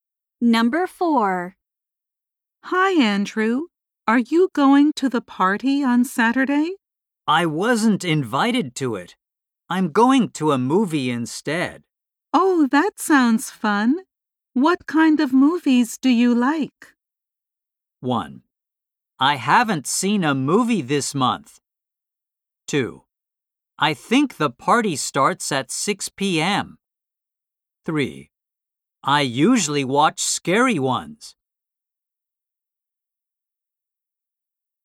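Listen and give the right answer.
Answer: 3: I usually watch scary ones.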